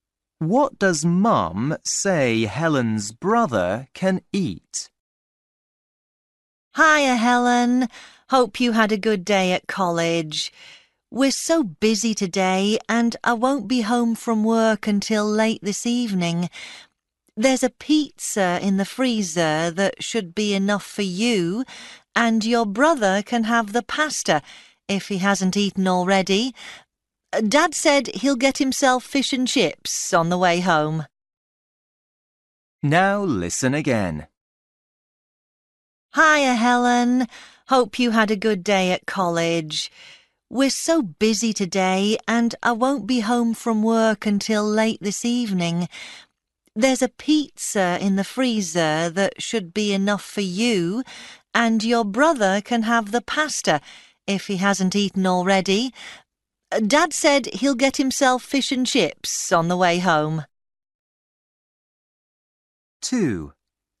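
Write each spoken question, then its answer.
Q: What does Mum say Helen's brother can eat?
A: pasta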